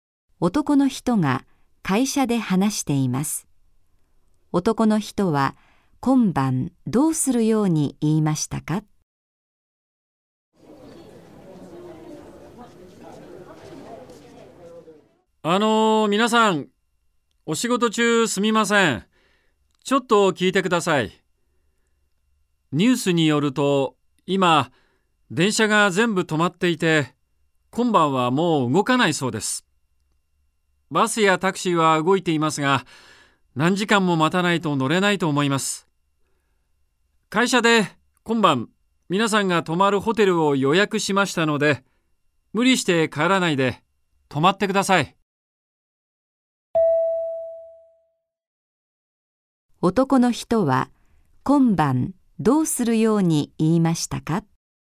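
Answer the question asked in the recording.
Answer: 会社が予約したホテルに泊まる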